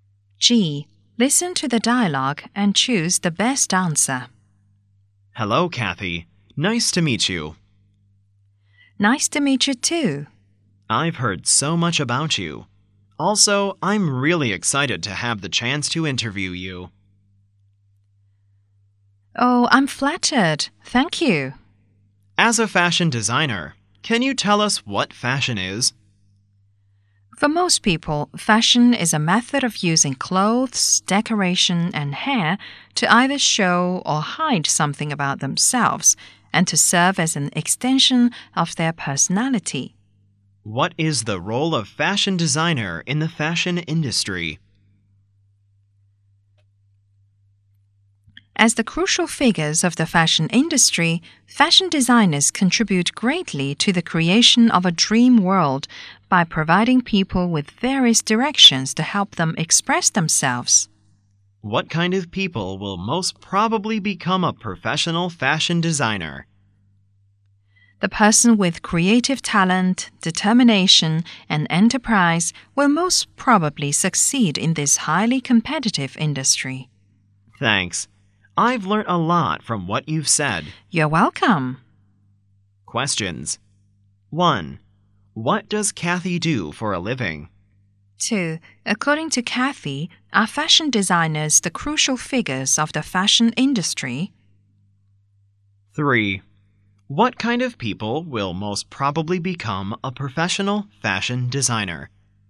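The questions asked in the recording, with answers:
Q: What does Kathy do for a living?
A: She is a fashion designer

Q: According to Kathy, are fashion designers the crucial figures of the fashion industry?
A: Yes

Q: What kind of people will most probably become a professional fashion designer?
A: People with creative talent, determination and enterprise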